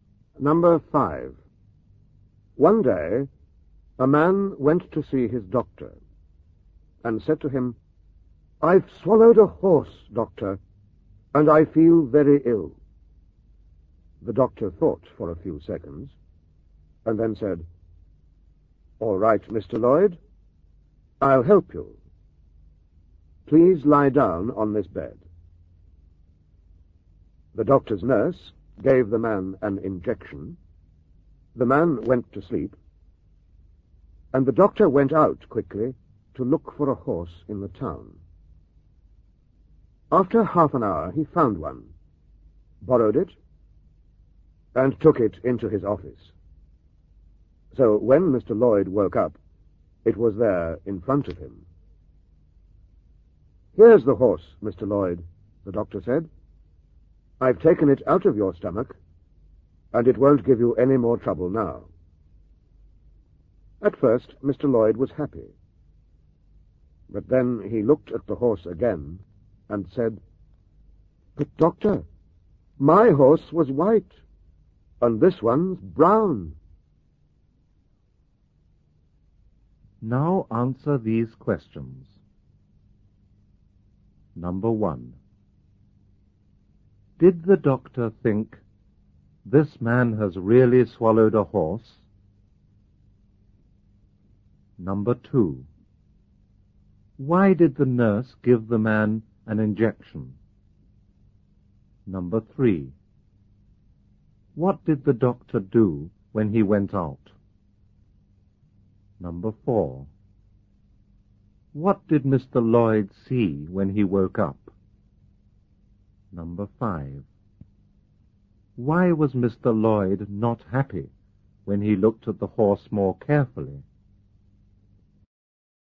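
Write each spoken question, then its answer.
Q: Did the doctor think, "This man has really swallowed a horse"?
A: No

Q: What did the doctor do when he went out?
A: He looked for a horse in the town, borrowed one and took it into his office

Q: What did Mr. Lloyd see when he woke up?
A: A horse in front of him

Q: Why was Mr. Lloyd not happy when he looked at the horse more carefully?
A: Because his horse was white and this one was brown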